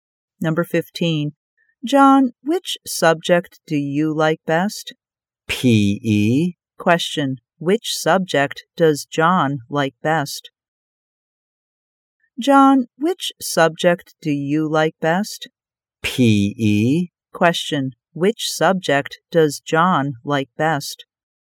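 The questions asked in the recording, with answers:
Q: Which subject does John like best?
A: P.E.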